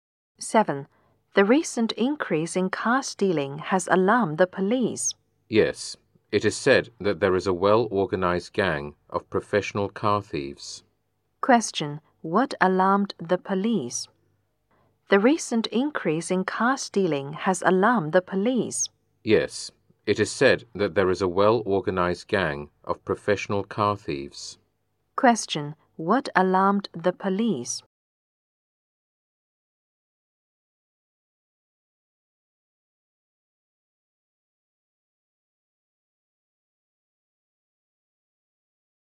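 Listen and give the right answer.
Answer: The recent increase in car stealing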